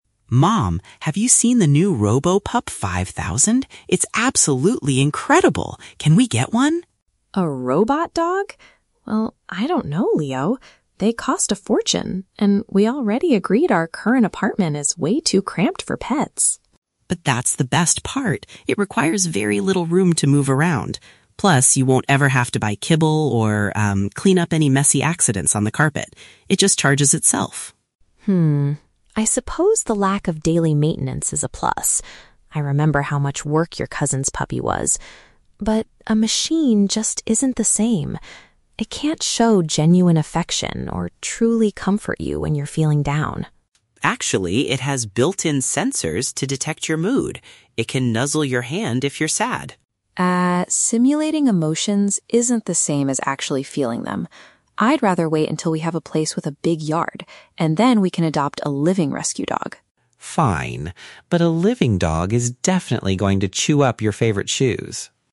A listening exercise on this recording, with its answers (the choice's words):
Listen to a conversation between a mother and her son, then choose the correct answer (A, B, or C) for each question.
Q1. Why does Leo think the Robo-Pup is suitable for their current living situation?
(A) It is very affordable for the family.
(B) It does not take up a lot of physical space.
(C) It can protect their apartment from strangers.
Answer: It does not take up a lot of physical space.

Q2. What is the mother's main concern about the robotic pet?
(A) It lacks a true emotional connection.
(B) It requires too much effort to look after.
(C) It might ruin the furniture and carpets.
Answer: It lacks a true emotional connection.

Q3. What does the mother prefer to do in the future?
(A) Purchase the robot dog when the price drops.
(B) Get a real puppy for Leo's cousin.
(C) Move to a larger property and get a real animal.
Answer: Move to a larger property and get a real animal.

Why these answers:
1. In the audio, Leo says the robot dog "requires very little room to move around," which means it does not need a lot of space.
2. The mother says the machine "can't show genuine affection or truly comfort you." This matches the idea of lacking a true emotional connection.
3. The mother clearly states she wants to wait until they have "a place with a big yard" (a larger property) to adopt a "living rescue dog" (a real animal).

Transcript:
Leo: Mom, have you seen the new Robo-Pup 5000? It's absolutely incredible! Can we get one?
Mom: A robot dog? Well, I don't know, Leo. They cost a fortune, and we already agreed our current apartment is way too cramped for pets.
Leo: But that's the best part! It requires very little room to move around. Plus, you won't ever have to buy kibble or, um, clean up any messy accidents on the carpet. It just charges itself!
Mom: Hmm, I suppose the lack of daily maintenance is a plus. I remember how much work your cousin's puppy was. But... a machine just isn't the same. It can't show genuine affection or truly comfort you when you're feeling down.
Leo: Actually, it has built-in sensors to detect your mood! It can nuzzle your hand if you're sad.
Mom: Ah, simulating emotions isn't the same as actually feeling them. I'd rather wait until we have a place with a big yard, and then we can adopt a living rescue dog.
Leo: Fine. But a living dog is definitely going to chew up your favorite shoes!